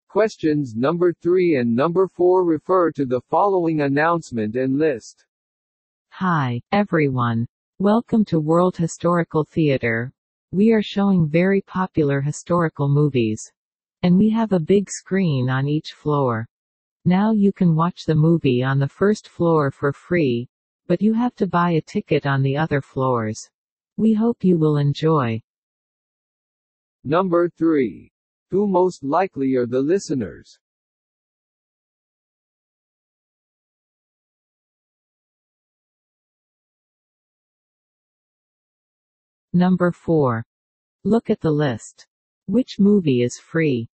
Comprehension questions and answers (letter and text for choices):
Who most likely are the listeners?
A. Movie actors.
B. Audiences.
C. Employees.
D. Ticket sellers.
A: B. Audiences.

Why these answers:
話し手は劇場スタッフ、聞き手は観衆でしたね。

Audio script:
Questions No.3 and No.4 refer to the following announcement and list.
Hi everyone! Welcome to World Historical Theater! We are showing very popular historical movies. And we have a big screen on each floor. Now you can watch the movie on the first floor for free, but you have to buy a ticket on the other floors. We hope you will enjoy.